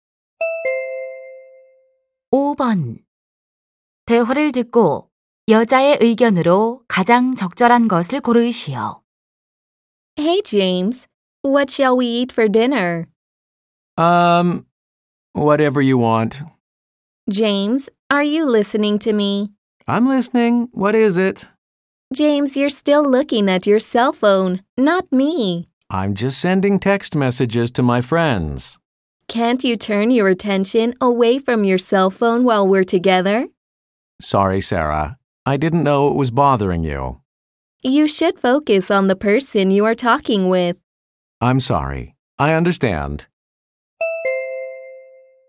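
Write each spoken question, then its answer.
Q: 대화를 듣고 여자의 의견으로 가장 적절한 것을 고르시오.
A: 대화 중에는 상대방에게 집중해야 한다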